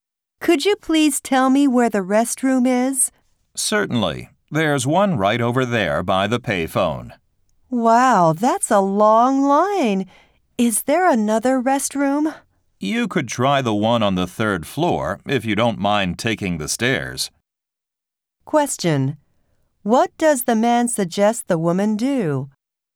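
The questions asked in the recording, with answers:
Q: What does the man suggest the woman do?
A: Use the restroom on the third floor (take the stairs)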